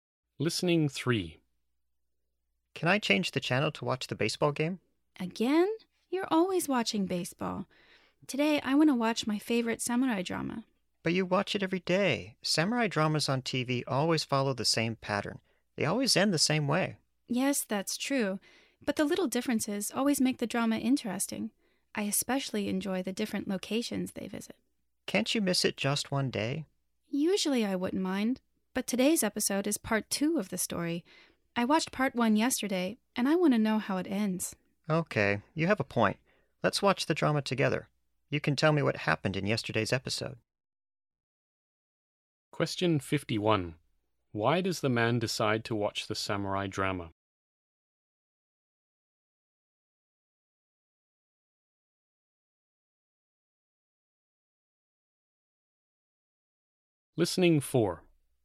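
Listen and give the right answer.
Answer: Because today's episode is part 2 and the woman wants to know how the story ends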